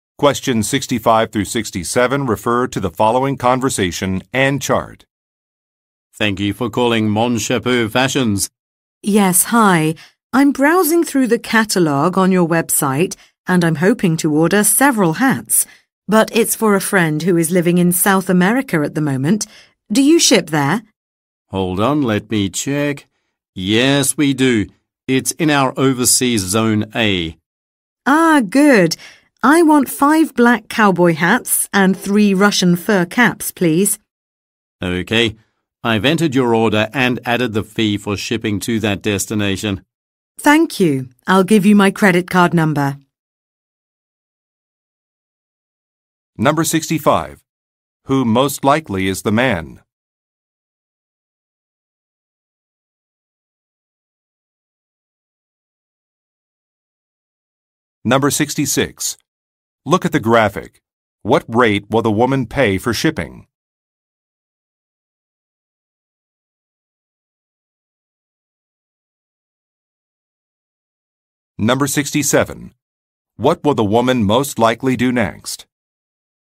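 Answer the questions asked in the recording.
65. A customer service representative at a hat company
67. Give her credit card number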